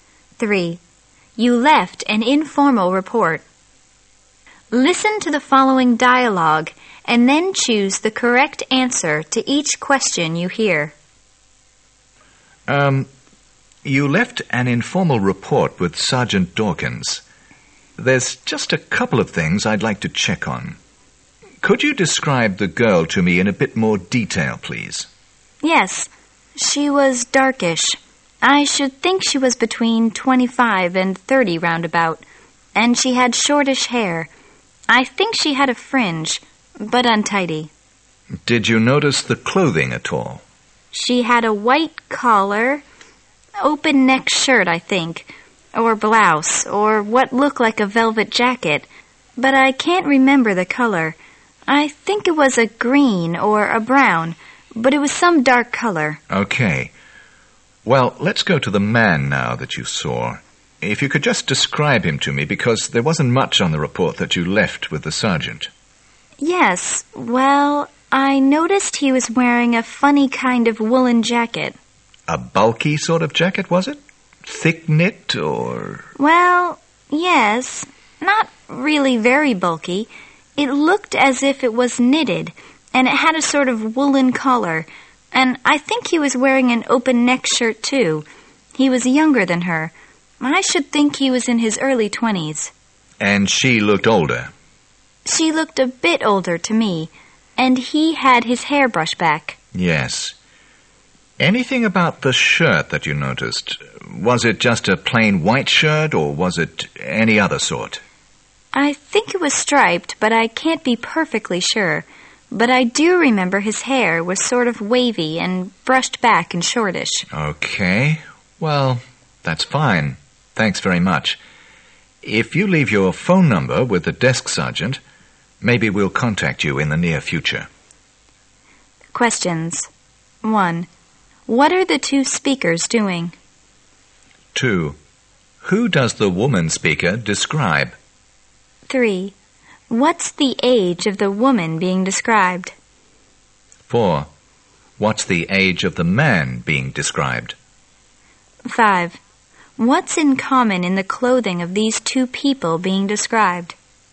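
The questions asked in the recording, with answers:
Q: What are the two speakers doing?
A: A police officer is questioning a witness about two people she saw

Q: Who does the woman speaker describe?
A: A girl and a man she saw

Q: What's the age of the woman being described?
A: Between 25 and 30

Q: What's the age of the man being described?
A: In his early 20s

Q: What's in common in the clothing of these two people being described?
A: Both wore open-neck shirts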